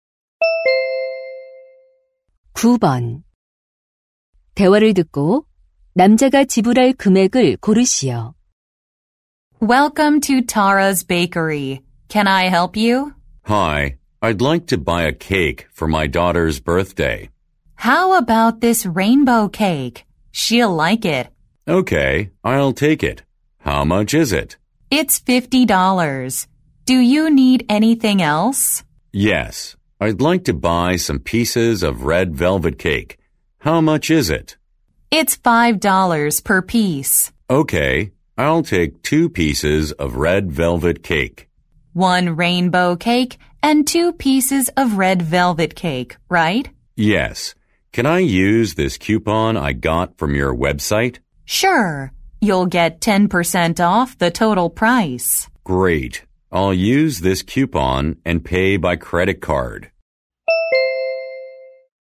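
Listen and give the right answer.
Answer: $54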